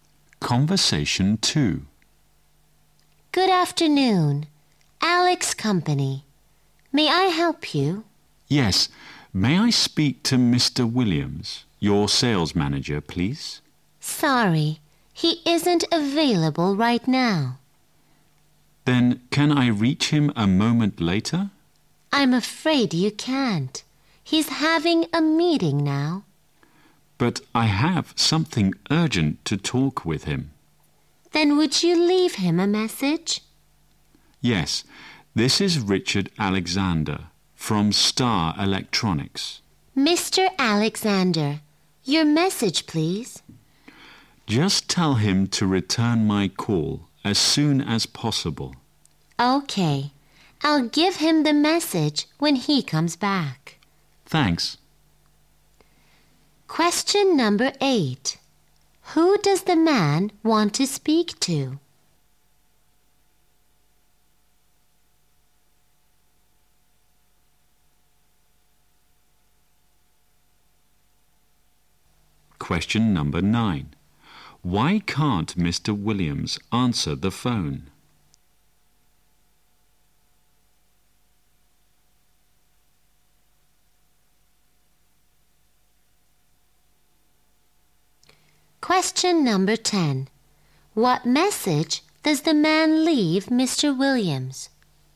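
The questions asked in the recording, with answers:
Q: Who does the man want to speak to?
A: Mr. Williams, the sales manager

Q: Why can't Mr. Williams answer the phone?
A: He's having a meeting

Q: What message does the man leave Mr. Williams?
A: To return his call as soon as possible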